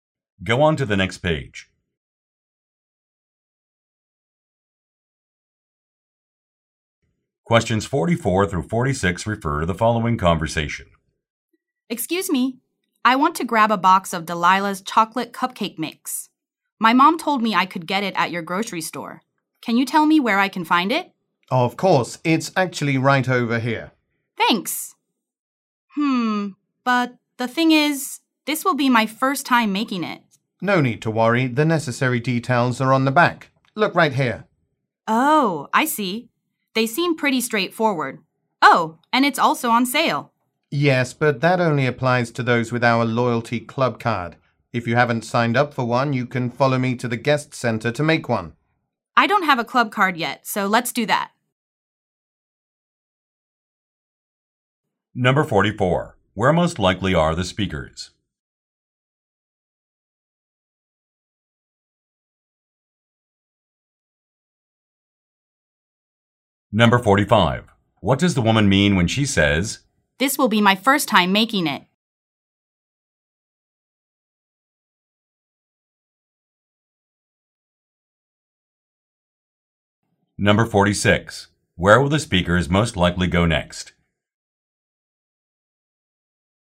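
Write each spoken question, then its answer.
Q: Where most likely are the speakers?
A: At a grocery store

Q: Where will the speakers most likely go next?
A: To the guest center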